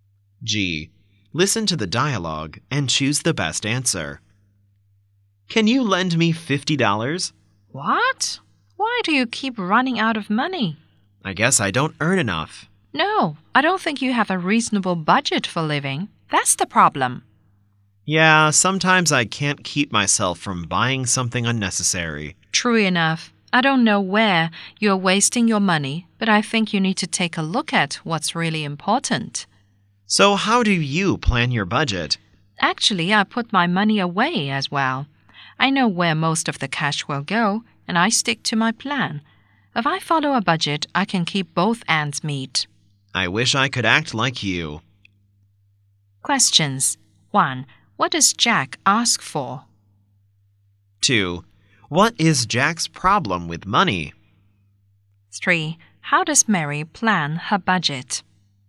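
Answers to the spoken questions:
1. To borrow $50
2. He has no reasonable budget and buys unnecessary things
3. She knows where the cash will go and sticks to her plan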